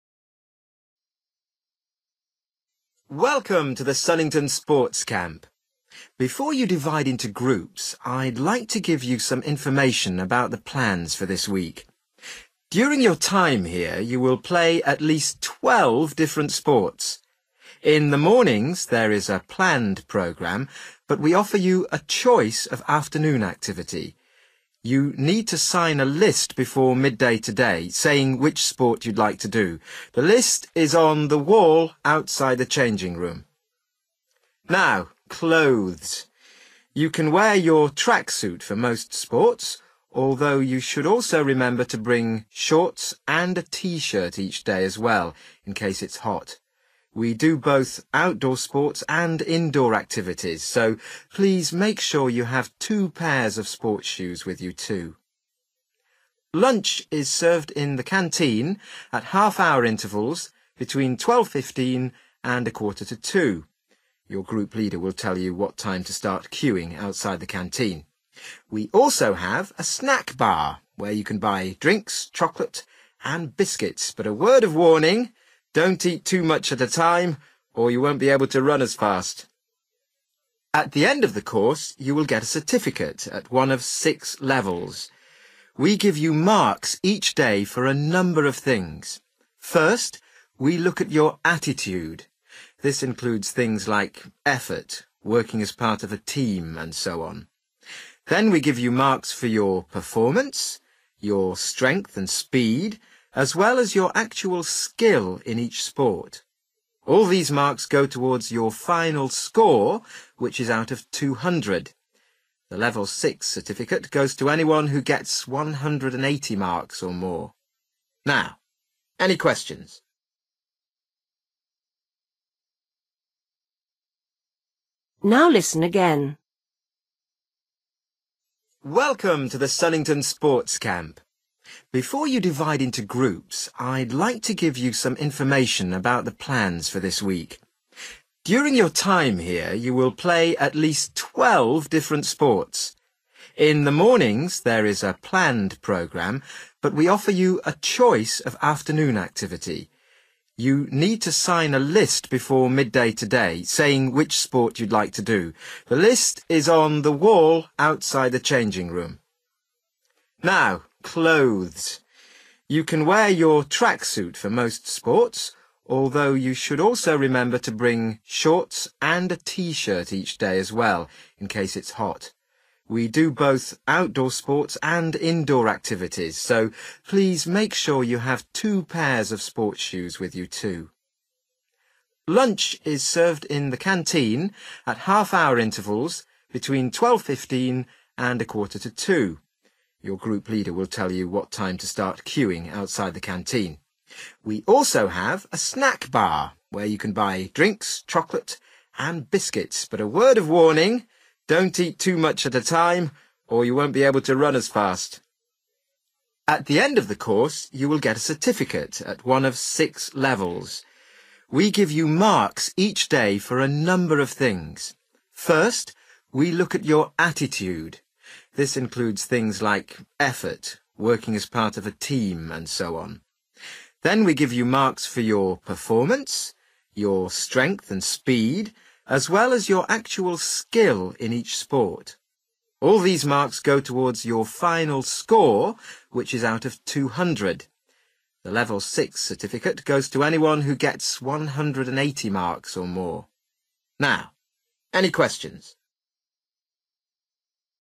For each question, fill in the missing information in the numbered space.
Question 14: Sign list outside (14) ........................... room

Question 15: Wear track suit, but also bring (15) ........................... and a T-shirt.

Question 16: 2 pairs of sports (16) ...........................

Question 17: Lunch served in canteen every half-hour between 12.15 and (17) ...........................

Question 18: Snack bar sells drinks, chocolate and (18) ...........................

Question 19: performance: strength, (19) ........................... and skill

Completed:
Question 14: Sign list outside (the) changing (room) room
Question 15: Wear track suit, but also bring shorts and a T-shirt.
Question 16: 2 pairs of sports shoe(s)
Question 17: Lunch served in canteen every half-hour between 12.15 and 1.45
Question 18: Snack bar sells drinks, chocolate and biscuit(s)
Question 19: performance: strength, speed(s) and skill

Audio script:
Man: Welcome to the Sunnington Sports Camp. Before you divide into groups, I'd like to give you some information about the plans for this week. During your time here you will play at least 12 different sports. In the mornings there is a planned programme, but we offer you a choice of afternoon activity. You need to sign a list before midday today, saying which sport you'd like to do. The list is on the wall outside the changing room.
Now, clothes. You can wear your track suit for most sports, although you should also remember to bring shorts and a T-shirt each day as well, in case it's hot. We do both outdoor sports and indoor activities, so please make sure you have two pairs of sports shoes with you, too.
Lunch is served in the canteen at half hour intervals between 12.15 and a quarter to two. Your group leader will tell you what time to start queuing outside the canteen. We also have a snack bar, where you can buy drinks, chocolate and biscuits, but a word of warning: don't eat too much at a time, or you won't be able to run as fast!
At the end of the course, you will get a certificate, at one of six levels. We give you marks each day for a number of things. First, we look at your attitude: this includes things like effort, working as part of a team, and so on. Then we give you marks for your performance, your strength and speed, as well as your actual skill in each sport. All these marks go towards your final score, which is out of 200. The Level six certificate goes to anyone who gets 180 marks or more.
Now, any questions?

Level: B1